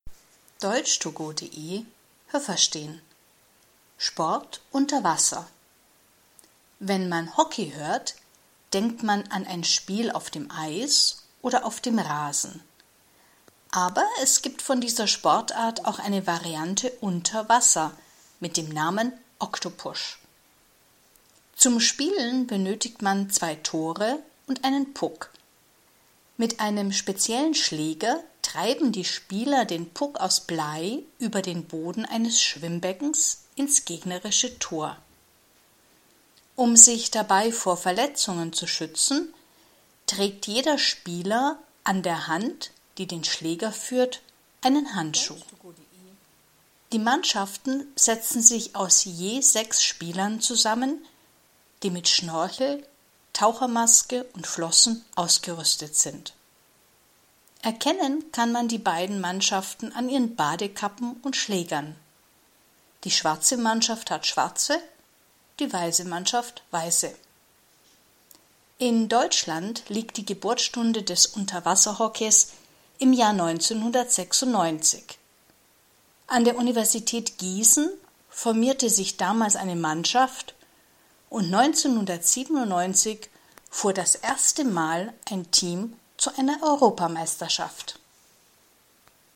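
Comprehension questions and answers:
Was haben Sie gehört? Es gibt nur eine korrekte Antwort.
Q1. Wo kann man Hockey spielen?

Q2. Zum Spielen beim Unterwasserhockey braucht man ...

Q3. Der Puck ...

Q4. Wie viele Handschuhe trägt ein Spieler?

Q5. Wie viele Spieler gibt es bei einem Spiel?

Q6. Wie kann man die beiden Mannschaften unterscheiden?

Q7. Im Jahr _____ gab es in Deutschland das erste Mal Unterwasserhockey.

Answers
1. auf dem Eis, auf dem Rasen und unter Wasser
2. zwei Tore und einen Puck
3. ist aus Blei
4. einen
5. zwölf (je sechs pro Mannschaft)
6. an ihren Badekappen und Schlägern
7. 1996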